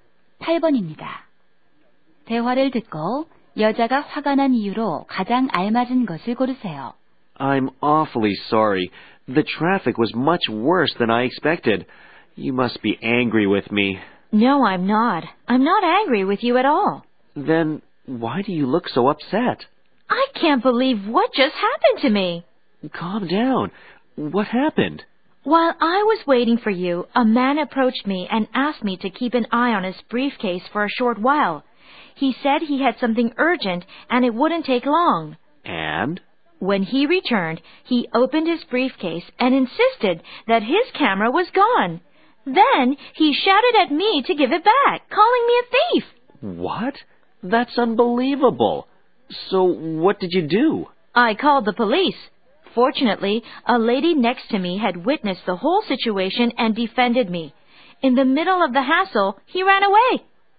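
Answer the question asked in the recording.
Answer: 낯선 남자가 그녀를 카메라 도둑으로 몰았기 때문에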